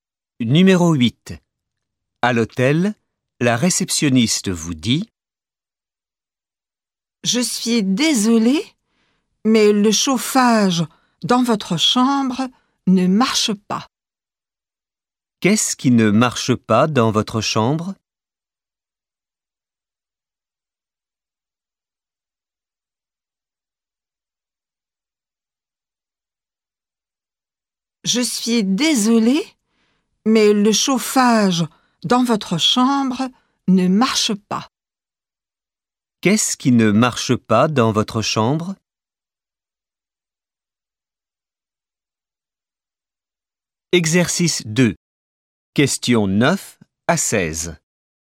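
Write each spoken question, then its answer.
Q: Qu'est-ce qui ne marche pas dans votre chambre?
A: Le chauffage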